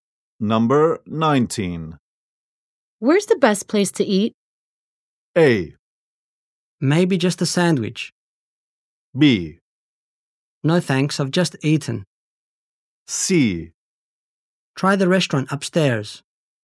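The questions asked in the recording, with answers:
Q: Where's the best place to eat?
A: C: Try the restaurant upstairs.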